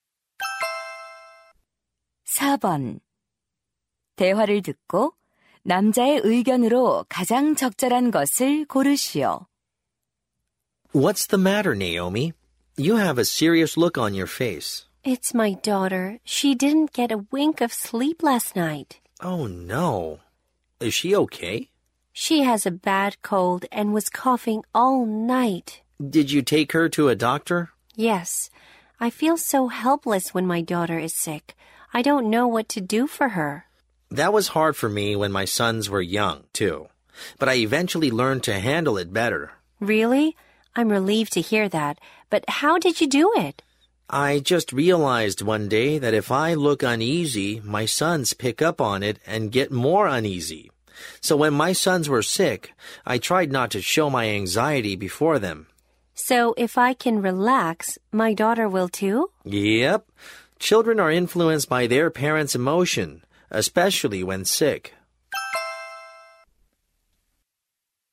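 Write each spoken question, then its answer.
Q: 대화를 듣고 남자의 의견으로 가장 적절한 것을 고르시오.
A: 아이가 아플 때 부모는 불안한 감정을 드러내지 않아야 한다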